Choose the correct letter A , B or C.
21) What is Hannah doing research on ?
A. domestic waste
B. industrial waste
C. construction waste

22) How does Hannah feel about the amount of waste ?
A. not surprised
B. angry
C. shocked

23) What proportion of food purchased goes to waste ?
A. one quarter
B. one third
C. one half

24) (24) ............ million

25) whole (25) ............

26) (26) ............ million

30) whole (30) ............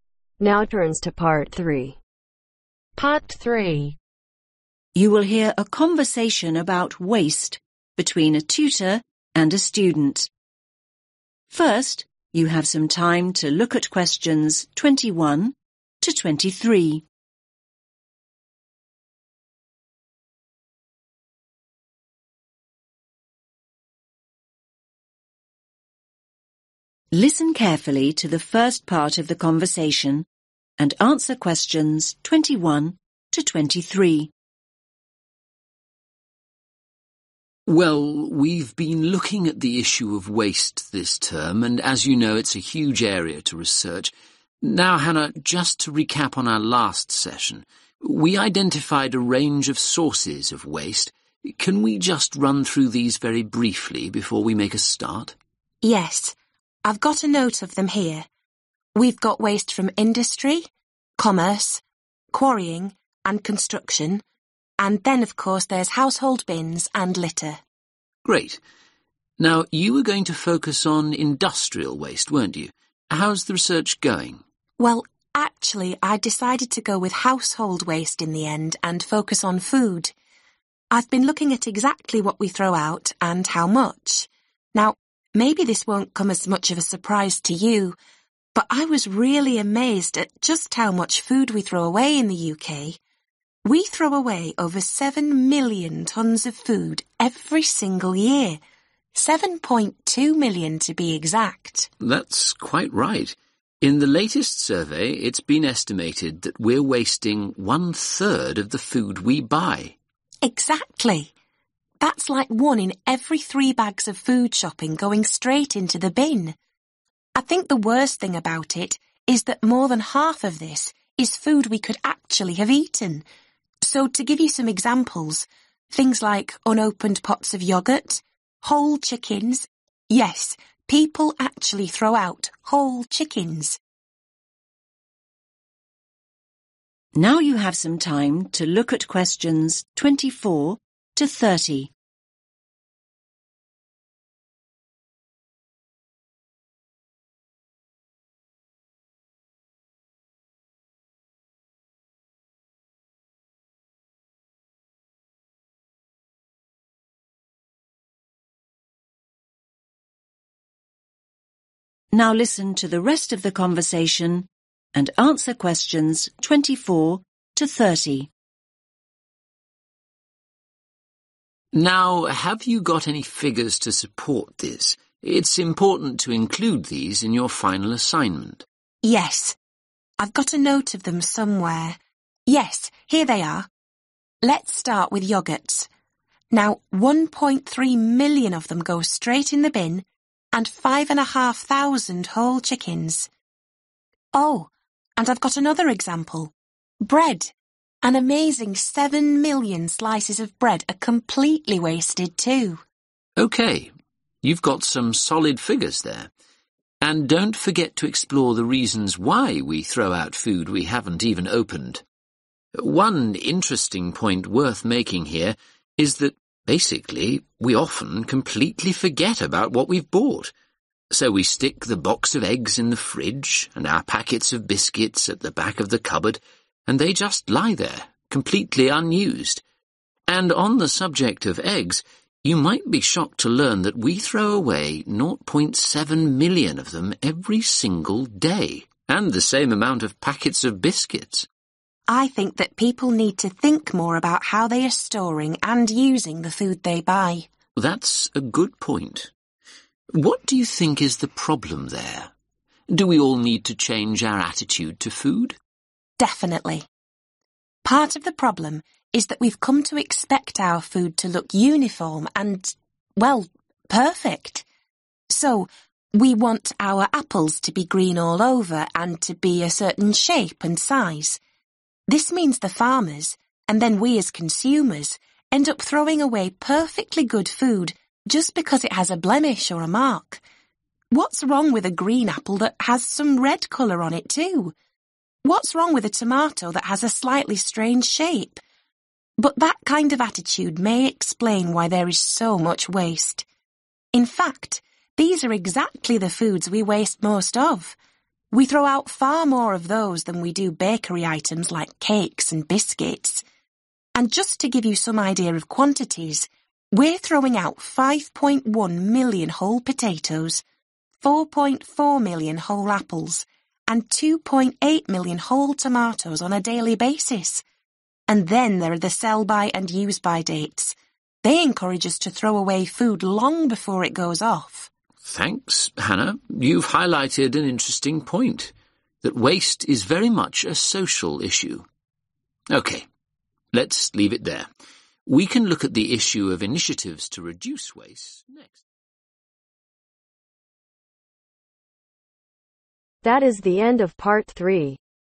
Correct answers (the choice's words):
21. domestic waste
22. shocked
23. one third
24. 1.3
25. Chickens
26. 7
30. tomatoes